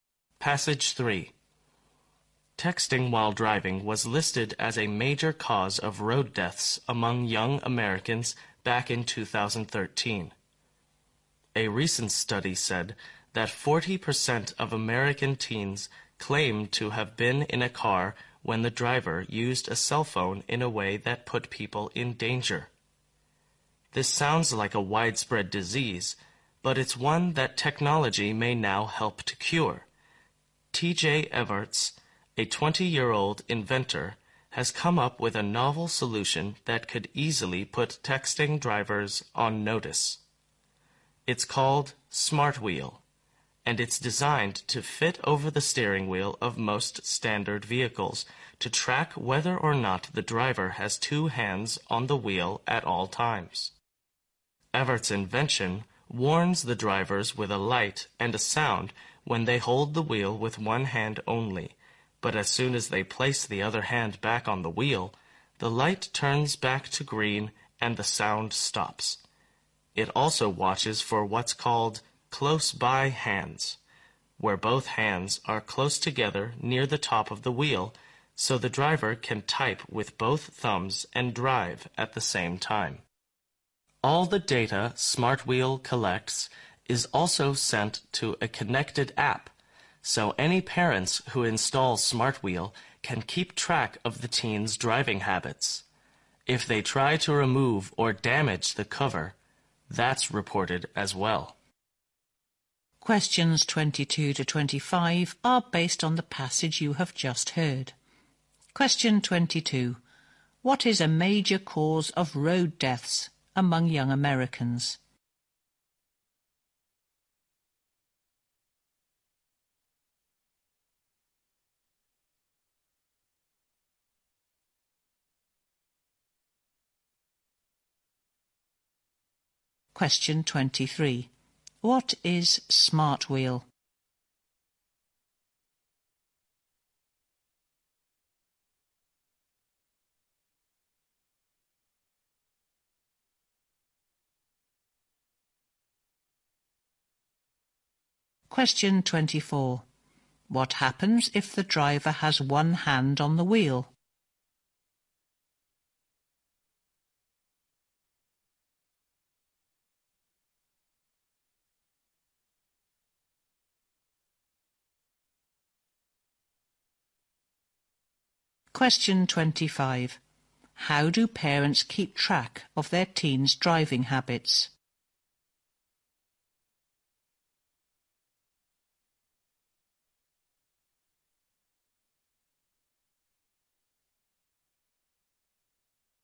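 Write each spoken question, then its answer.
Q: What is a major cause of road deaths among young Americans?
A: Texting while driving.

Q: What is Smart Wheel?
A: A cover for the steering wheel that tracks whether the driver keeps both hands on the wheel.

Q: What happens if the driver has one hand on the wheel?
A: A light and a sound warn the driver.

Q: How do parents keep track of their teens' driving habits?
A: Through a connected app that receives Smart Wheel's data.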